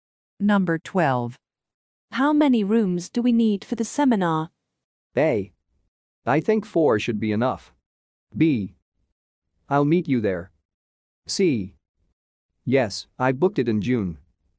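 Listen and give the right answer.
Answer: A: I think 4 should be enough.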